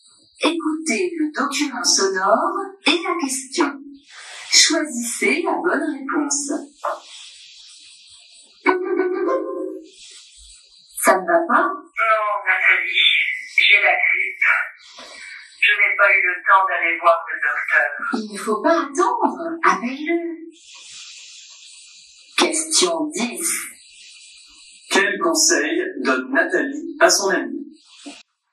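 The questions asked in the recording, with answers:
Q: Quel conseil donne Nathalie à son amie?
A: D'appeler le docteur sans attendre.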